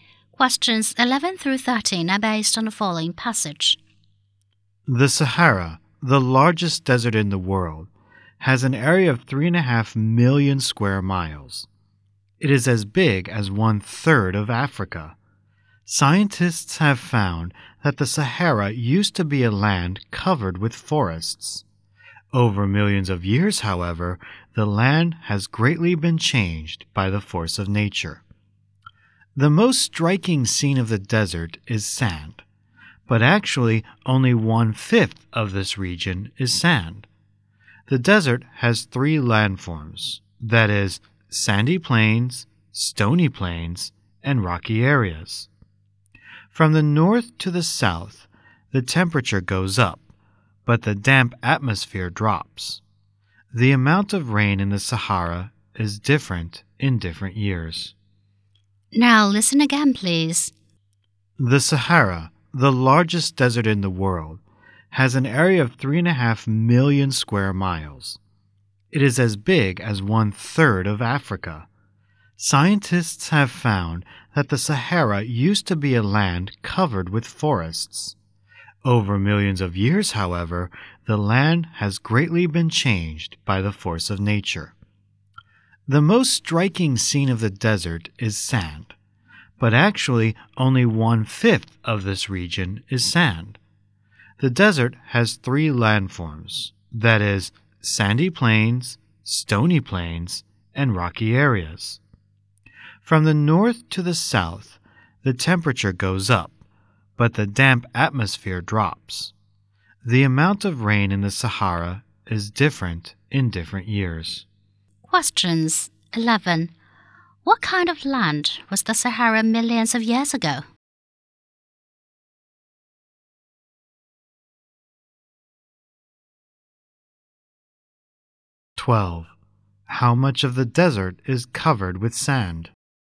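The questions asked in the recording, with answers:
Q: What kind of land was the Sahara millions of years ago?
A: Land covered with forests

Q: How much of the desert is covered with sand?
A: One fifth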